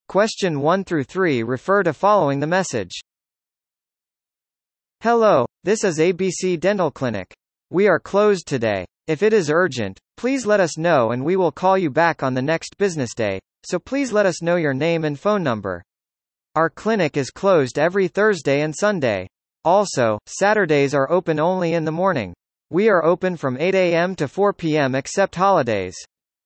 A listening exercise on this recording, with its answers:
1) Where is the phone addressed?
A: 歯科医院

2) What days are the clinics closed?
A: 木曜日

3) What time does the clinic open on business days?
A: 16時

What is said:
Hello, this is ABC Dental Clinic.
We are closed today. If it is urgent, please let us know and we will call you back on the next business day, so please let us know your name and phone number.
Our clinic is closed every Thursday and Sunday. Also, Saturdays are open only in the morning.